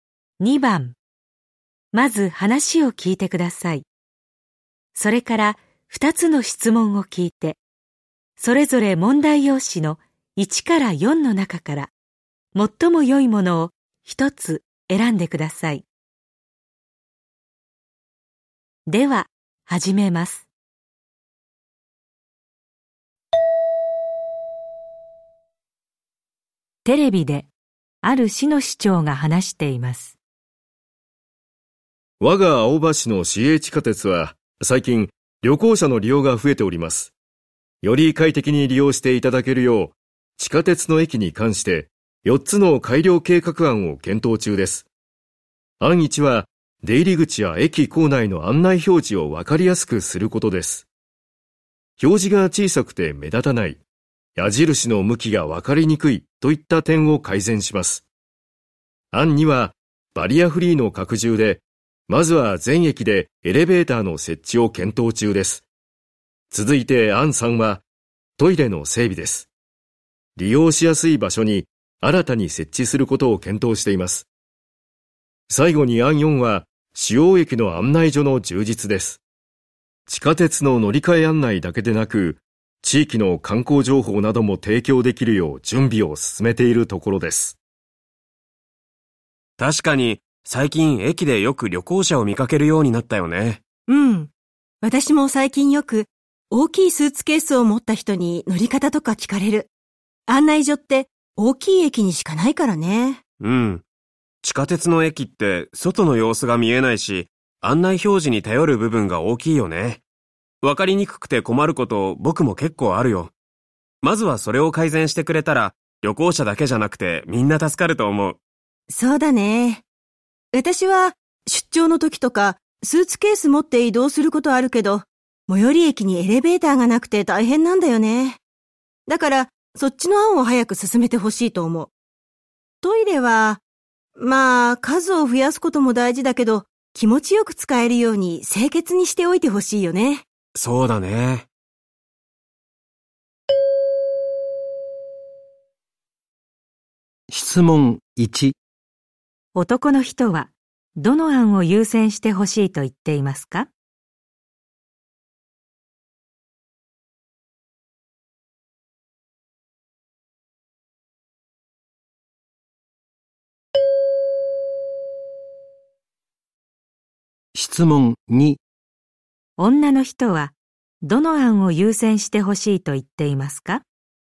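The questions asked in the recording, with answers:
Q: 男の人はどの案を優先してほしいと言っていますか?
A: 案1: 案内表示を分かりやすくすること

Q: 女の人はどの案を優先してほしいと言っていますか?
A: 案2: エレベーターの設置(バリアフリーの拡充)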